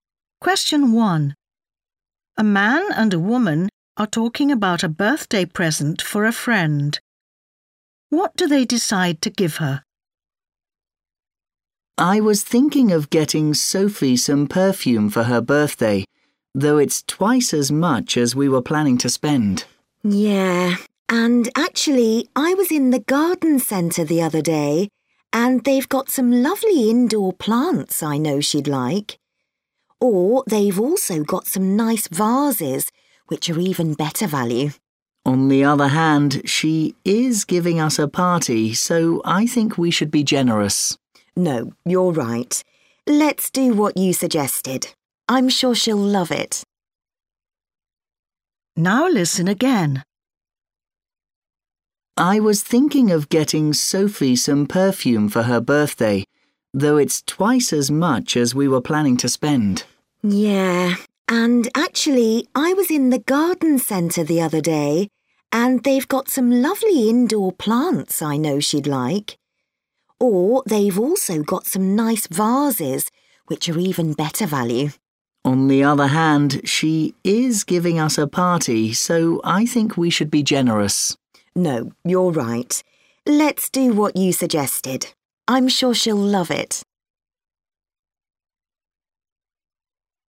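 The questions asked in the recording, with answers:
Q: What do they decide to give her?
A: perfume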